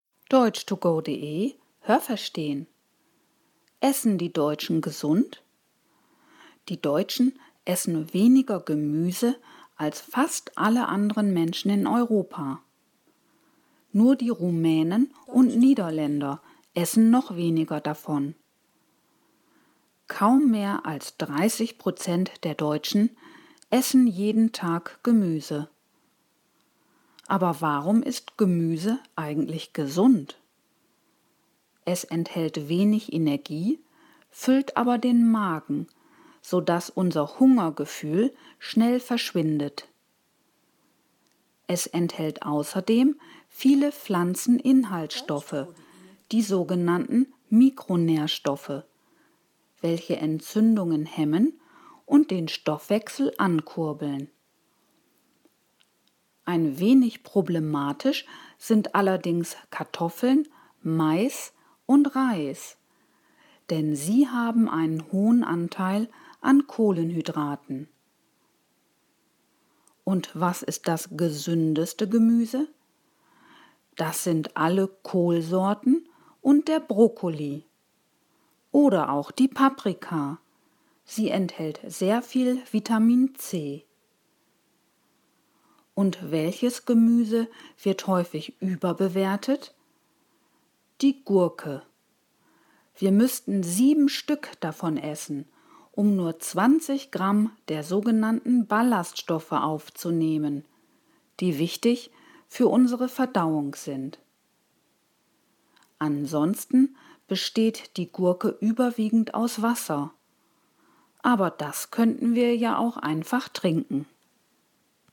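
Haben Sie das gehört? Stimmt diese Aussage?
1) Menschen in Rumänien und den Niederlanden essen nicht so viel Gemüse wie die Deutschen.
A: Richtig

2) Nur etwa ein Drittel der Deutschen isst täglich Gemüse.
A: Richtig

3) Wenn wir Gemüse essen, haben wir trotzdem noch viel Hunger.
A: Falsch

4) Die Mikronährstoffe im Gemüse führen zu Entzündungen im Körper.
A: Falsch

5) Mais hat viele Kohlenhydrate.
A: Richtig

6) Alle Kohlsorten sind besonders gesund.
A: Richtig

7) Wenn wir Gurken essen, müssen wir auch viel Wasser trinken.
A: Falsch

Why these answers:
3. Es füllt den Magen, sodass unser Hungergefühl schnell verschwindet.
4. Sie hemmen Entzündungen, das heißt, sie wirken gegen Entzündungen.
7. Der Text sagt, dass Gurken überwiegend aus Wasser bestehen, aber wir dieses ja auch einfach trinken könnten.

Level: Hörtexte A (einfach)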